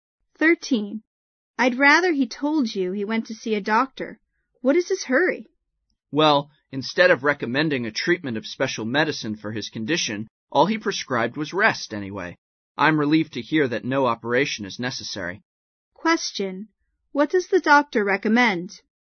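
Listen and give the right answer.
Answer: Rest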